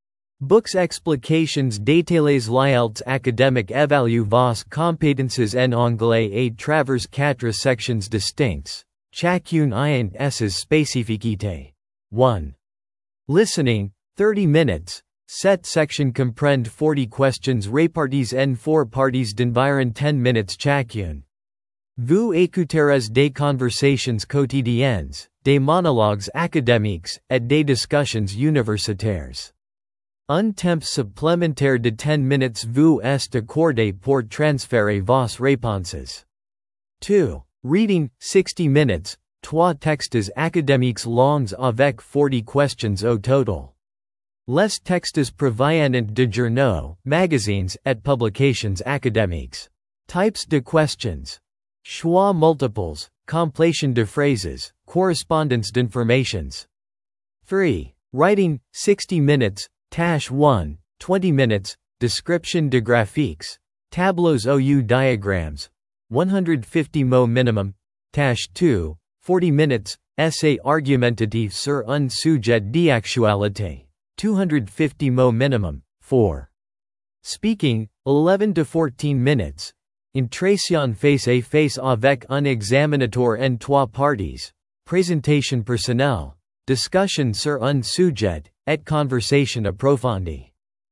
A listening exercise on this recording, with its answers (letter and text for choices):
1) Combien de questions y a-t-il dans la section Reading ?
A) 30 questions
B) 40 questions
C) 50 questions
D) 35 questions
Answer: B) 40 questions

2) Quelle est la durée de la section Speaking ?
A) 15-20 minutes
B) 10-15 minutes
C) 11-14 minutes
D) 8-12 minutes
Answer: C) 11-14 minutes

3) Dans Writing Task 1, quel est le nombre minimum de mots requis ?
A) 200 mots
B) 250 mots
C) 100 mots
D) 150 mots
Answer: D) 150 mots

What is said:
Comprendre la structure de chaque section vous permettra de développer une stratégie d'étude efficace et d'aborder l'examen avec confiance pour atteindre le Band 7+.
📚 Explications détaillées
L'IELTS Academic évalue vos compétences en anglais à travers quatre sections distinctes, chacune ayant ses spécificités :
1. Listening (30 minutes)
Cette section comprend 40 questions réparties en 4 parties d'environ 10 minutes chacune. Vous écouterez des conversations quotidiennes, des monologues académiques, et des discussions universitaires. Un temps supplémentaire de 10 minutes vous est accordé pour transférer vos réponses.
2. Reading (60 minutes)
Trois textes académiques longs avec 40 questions au total. Les textes proviennent de journaux, magazines, et publications académiques. Types de questions : choix multiples, complétion de phrases, correspondance d'informations.
3. Writing (60 minutes)
Tâche 1 (20 min) : Description de graphiques, tableaux ou diagrammes (150 mots minimum)
Tâche 2 (40 min) : Essai argumentatif sur un sujet d'actualité (250 mots minimum)
4. Speaking (11-14 minutes)
Entretien face-à-face avec un examinateur en trois parties : présentation personnelle, discussion sur un sujet, et conversation approfondie.

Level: Band 7+